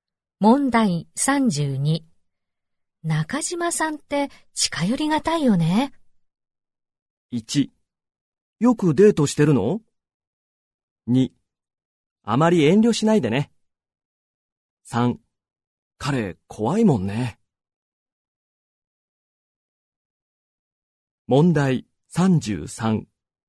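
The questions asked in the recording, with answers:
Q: 中島さんって近寄りがたいよね。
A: 3: 彼怖いもんね。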